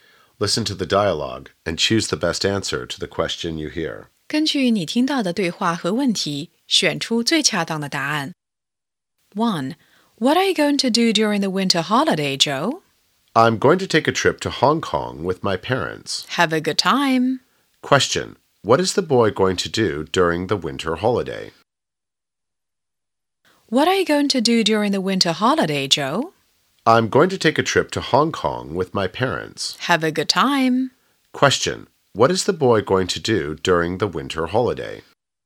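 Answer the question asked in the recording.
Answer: Take a trip to Hong Kong with his parents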